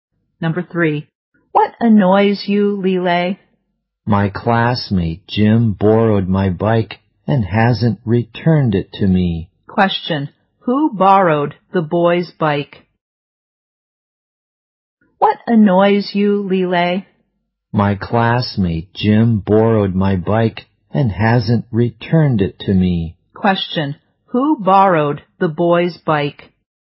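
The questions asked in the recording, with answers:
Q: who borrowed the boy's bike?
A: His classmate Jim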